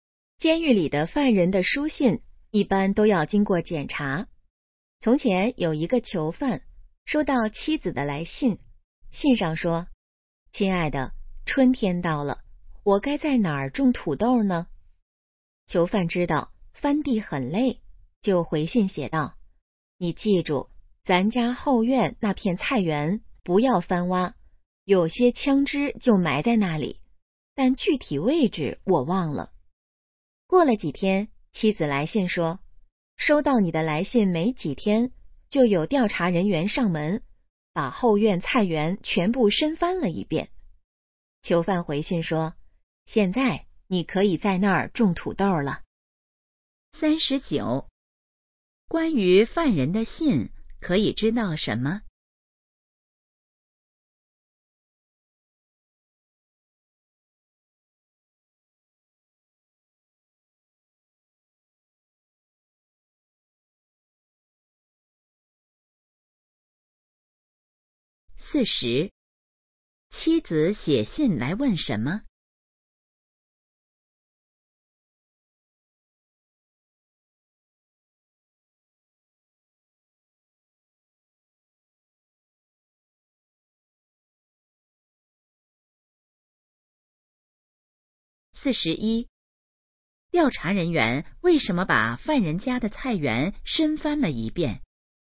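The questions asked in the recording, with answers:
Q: 妻子写信来问什么?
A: 该在哪儿种土豆

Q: 调查人员为什么把犯人家的菜园深翻了一遍?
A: 犯人信里说菜园里埋了枪支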